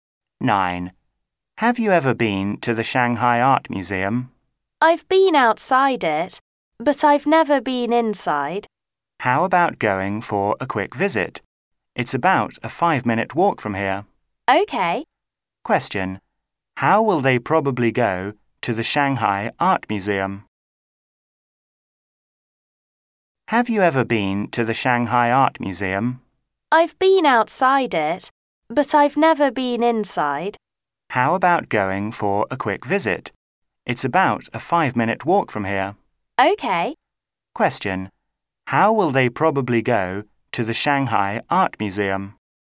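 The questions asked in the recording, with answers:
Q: How will they probably go to the Shanghai Art Museum?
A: On foot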